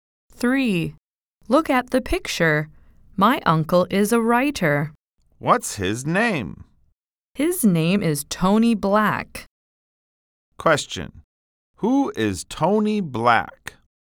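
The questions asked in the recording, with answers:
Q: Who is Tony Black?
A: The speaker's uncle, a writer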